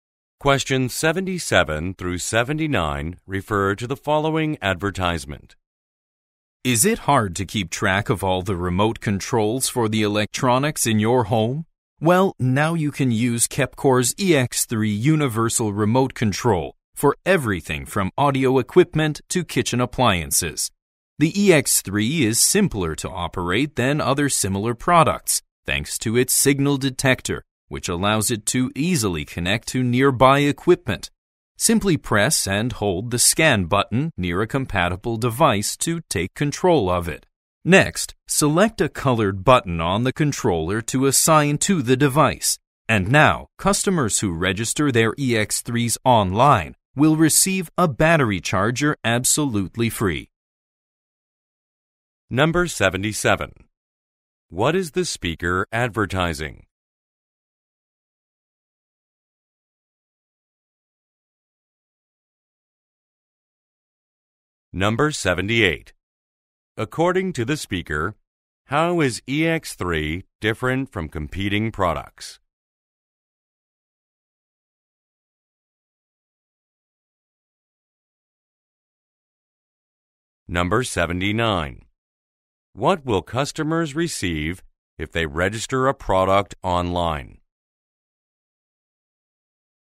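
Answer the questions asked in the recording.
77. A universal remote control
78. It is simpler to operate
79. A free battery charger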